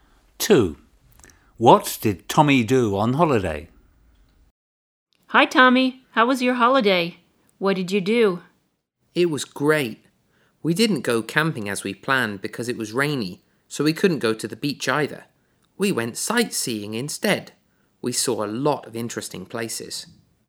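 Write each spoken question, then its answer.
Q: What did Tommy do on holiday?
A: went sightseeing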